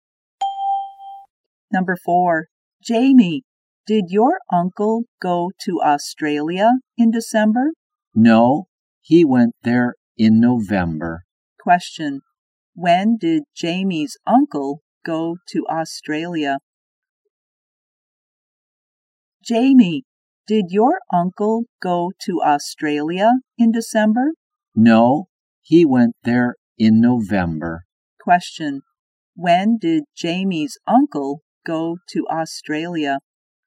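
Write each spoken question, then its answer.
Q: When did Jamie's uncle go to Australia?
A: In November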